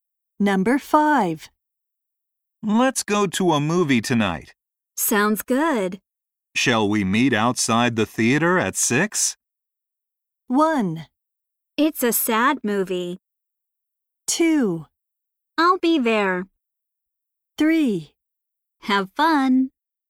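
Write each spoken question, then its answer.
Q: Shall we meet outside the theater at 6?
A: 2: I'll be there.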